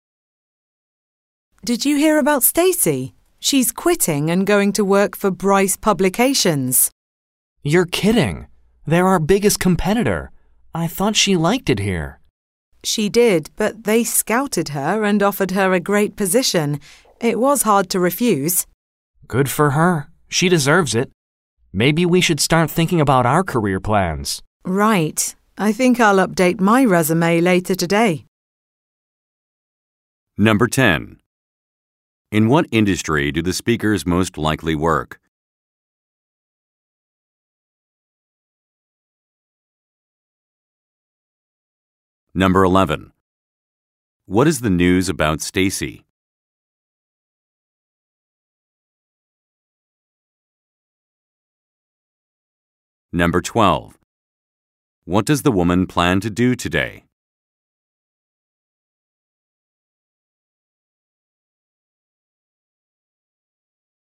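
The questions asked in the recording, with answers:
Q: In what industry do the speakers most likely work?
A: Publishing

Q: What is the news about Stacy?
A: She is quitting to work for Bryce Publications, a competitor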